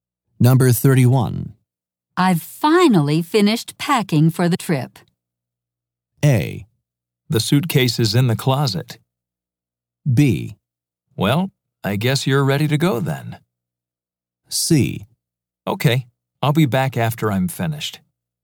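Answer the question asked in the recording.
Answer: B: Well, I guess you're ready to go then.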